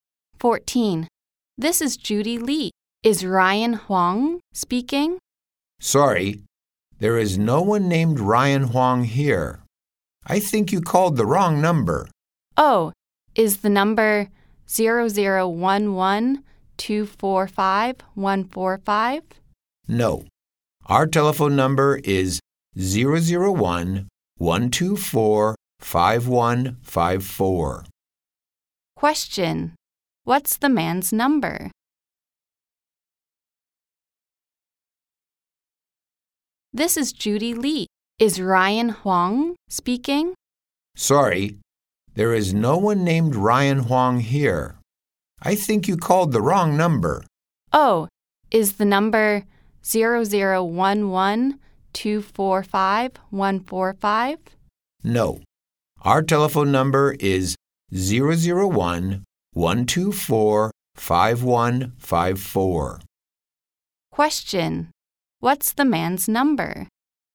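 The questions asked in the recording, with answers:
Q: What's the man's number?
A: 0011245154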